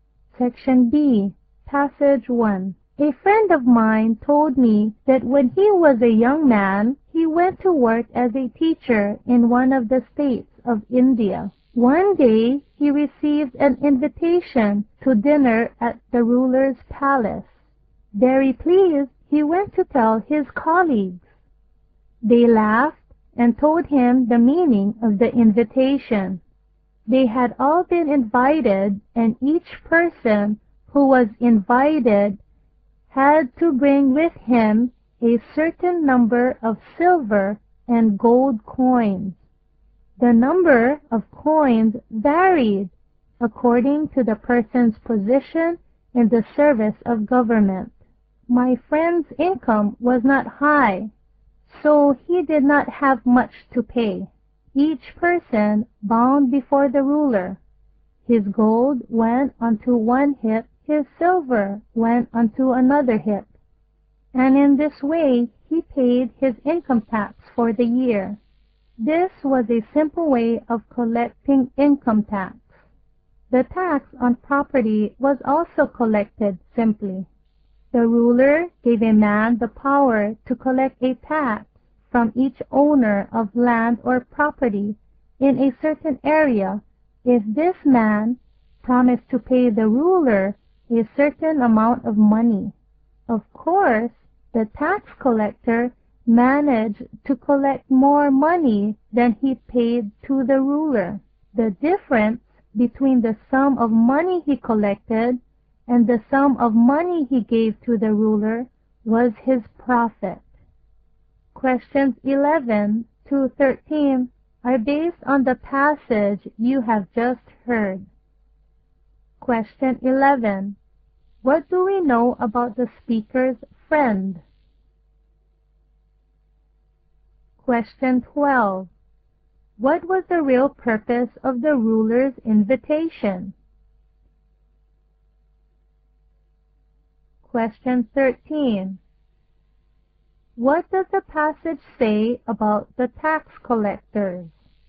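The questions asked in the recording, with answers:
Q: What do we know about the speaker's friend?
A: He was a teacher in India with a low income

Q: What was the real purpose of the ruler's invitation?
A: To collect income tax

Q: What does the passage say about the tax collectors?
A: They collected more than they paid the ruler and kept the difference as profit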